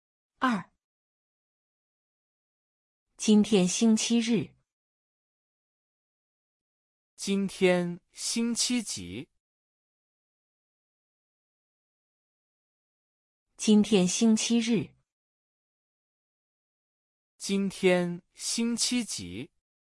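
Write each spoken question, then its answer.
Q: 今天星期几?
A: 星期日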